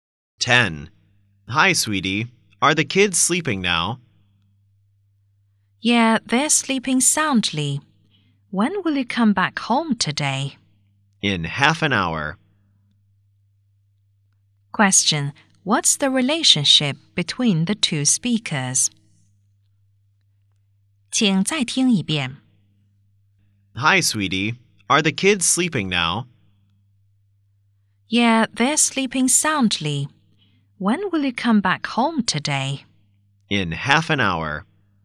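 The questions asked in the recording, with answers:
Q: what's the relationship between the two speakers?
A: Husband and wife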